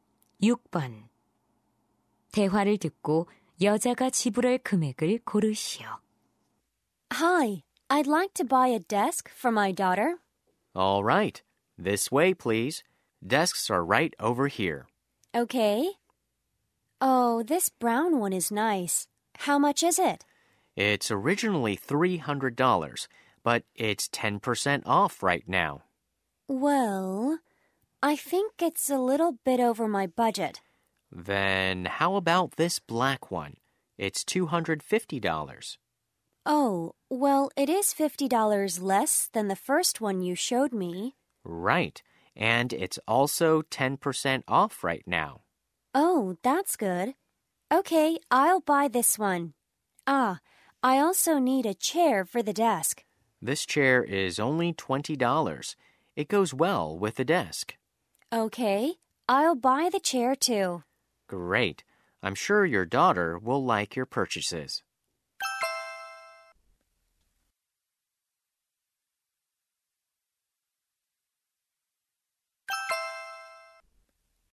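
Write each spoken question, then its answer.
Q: 대화를 듣고 여자가 지불할 금액을 고르시오.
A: $245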